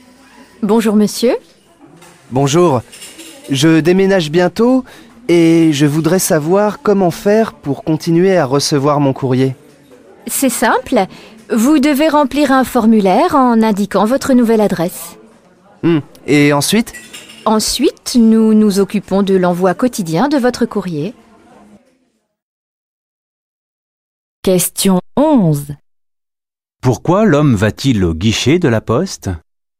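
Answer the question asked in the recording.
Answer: Pour faire suivre son courrier à sa nouvelle adresse après son déménagement.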